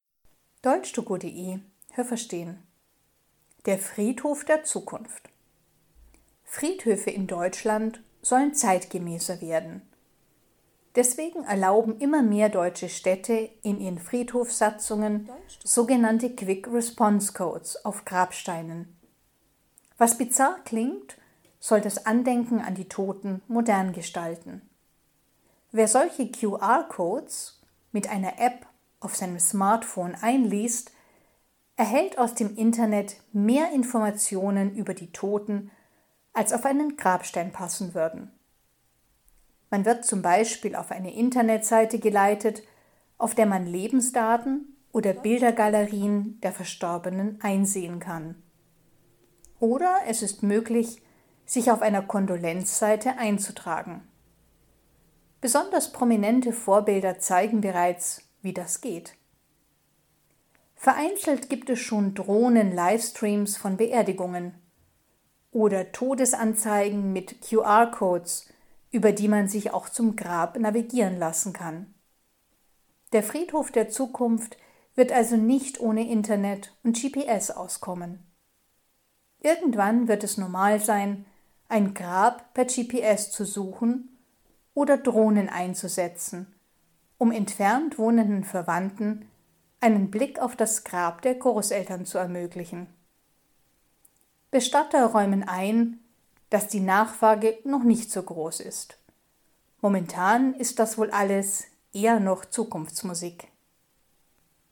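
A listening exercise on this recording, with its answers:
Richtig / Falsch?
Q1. QR-Codes auf Grabsteinen sind auf allen deutschen Friedhöfen erlaubt.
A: Falsch

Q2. Wenn man die QR-Codes öffnet, kann man z.B. sein Beileid aussprechen.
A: Richtig

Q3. Die QR-Codes sind nur bei Prominenten erlaubt.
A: Falsch

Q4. Es gibt bereits Beerdigungen, die über das Internet in Echtzeit übertragen werden.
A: Richtig

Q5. Es gibt bereits Todesanzeigen, bei denen QR-Codes den Weg zum Grab zeigen.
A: Richtig

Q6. In Zukunft werden Friedhöfe weder auf Internet noch auf GPS verzichten können.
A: Richtig

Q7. Heute ist es schon üblich, dass Verwandte, die weit entfernt wohnen, mit Hilfe einer Drohne ein Grab besuchen.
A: Falsch

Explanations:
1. Bis jetzt sind sie erst in einigen erlaubt.
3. Aber besonders Prominente nutzen die QR-Codes bereits.
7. Das wird vielleicht in Zukunft verbreitet sein.

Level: C (schwer)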